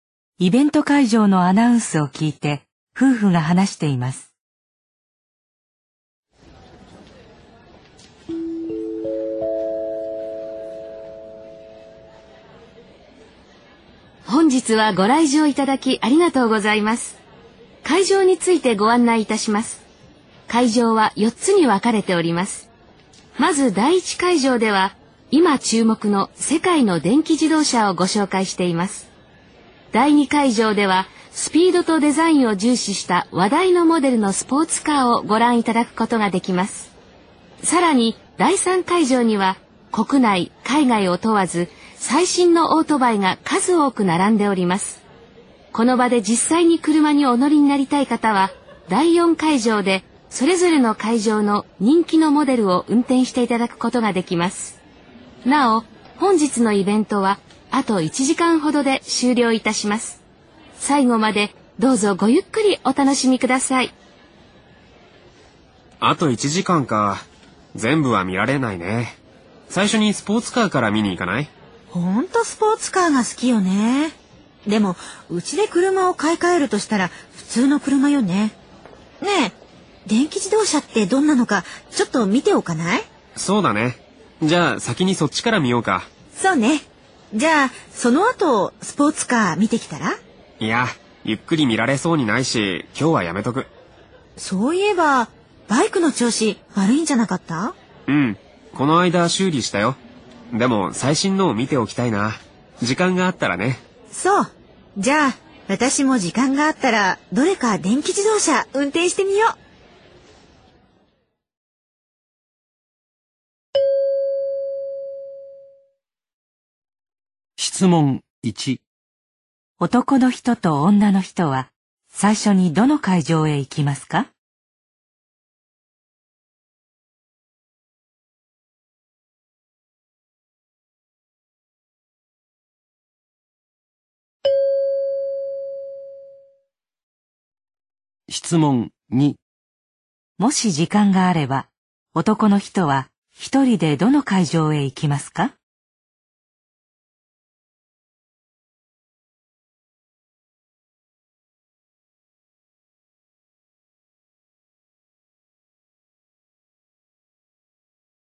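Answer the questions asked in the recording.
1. 第1会場(電気自動車)
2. 第3会場(オートバイ)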